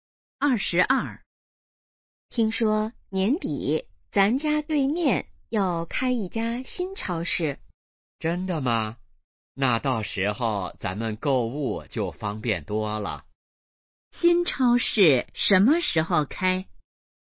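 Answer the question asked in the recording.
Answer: 年底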